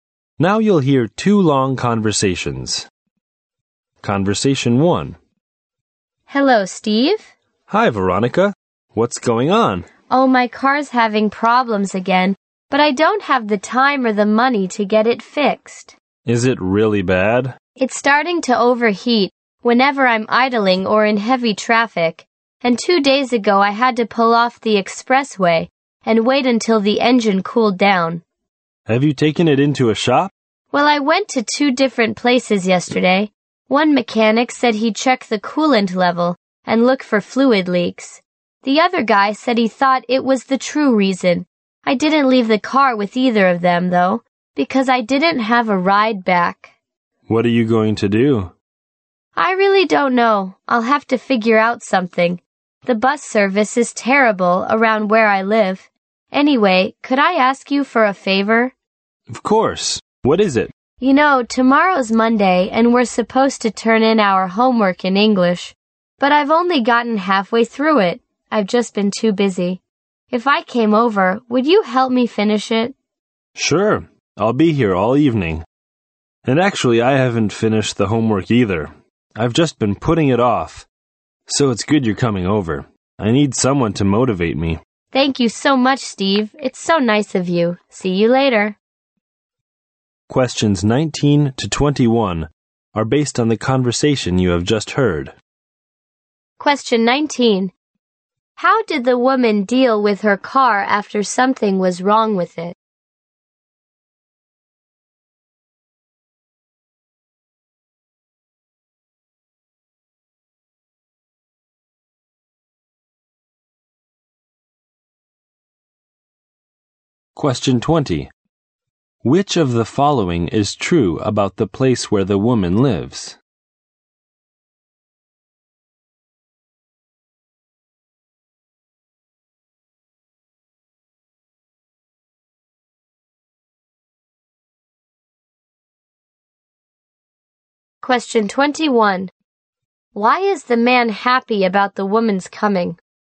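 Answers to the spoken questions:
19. She took it to two shops but didn't leave it at either
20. The bus service is terrible
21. He needs someone to motivate him to do his homework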